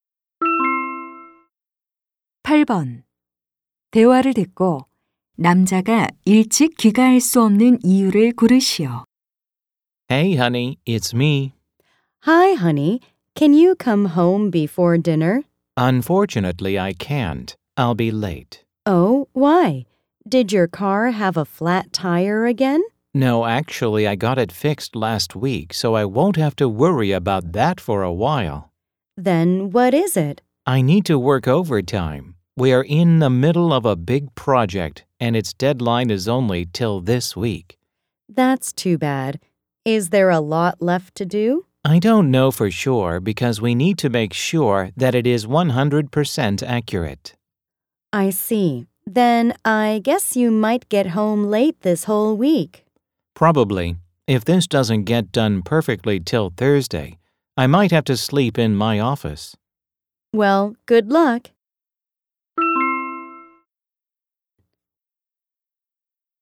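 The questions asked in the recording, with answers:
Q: 대화를 듣고 남자가 일찍 귀가할 수 없는 이유를 고르시오.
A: 프로젝트 마감 때문에 야근해야 해서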